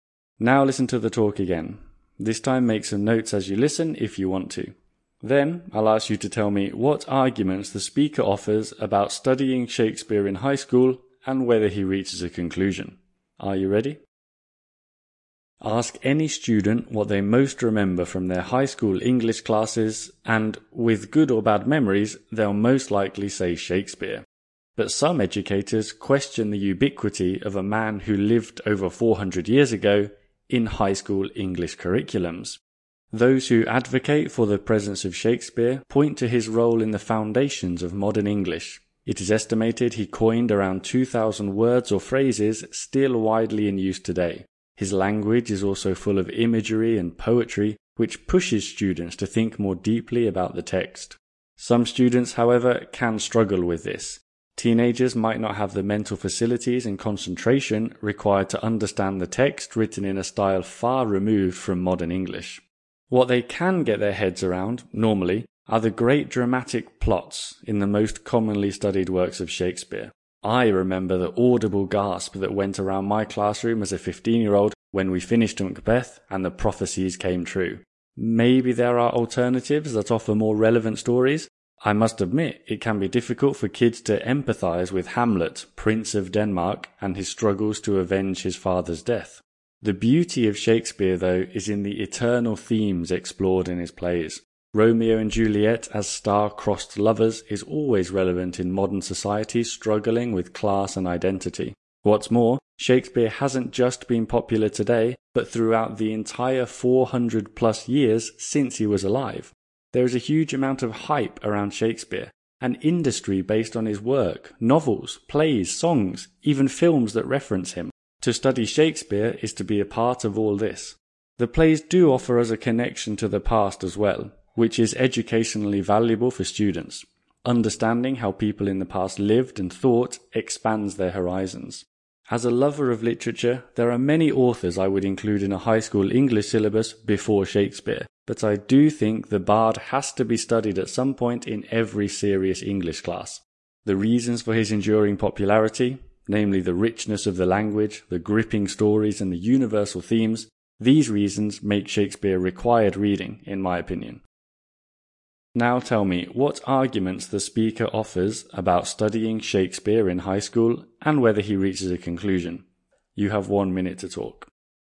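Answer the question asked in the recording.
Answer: For: his role in founding modern English (about 2,000 words coined), rich poetic language, gripping plots, universal themes, huge cultural presence, connection to the past. Against: the language is hard for teenagers and some stories feel less relevant. Conclusion: yes, Shakespeare should be studied at some point in every serious English class.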